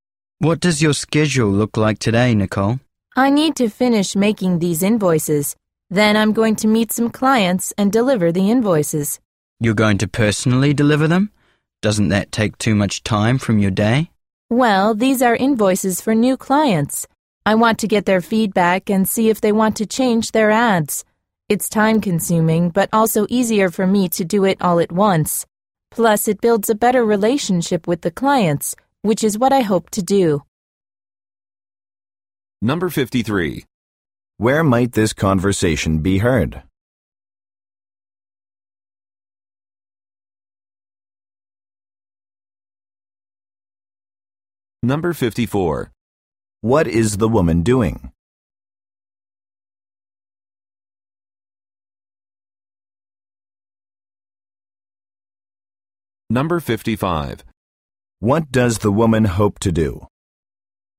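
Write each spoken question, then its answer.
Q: What is the woman doing?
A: Finishing making invoices

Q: What does the woman hope to do?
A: Build a better relationship with the clients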